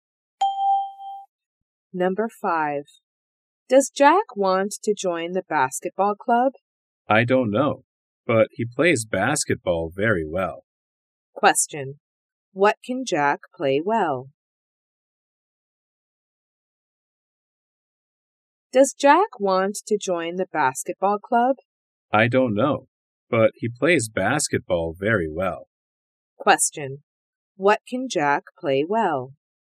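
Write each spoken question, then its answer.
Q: What can Jack play well?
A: Basketball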